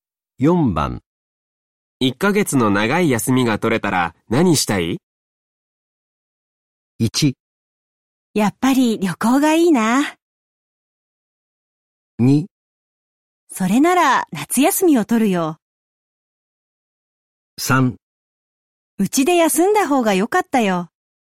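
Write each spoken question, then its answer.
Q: 1ヶ月の長い休みが取れたら何したい?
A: 1: やっぱり旅行がいいな。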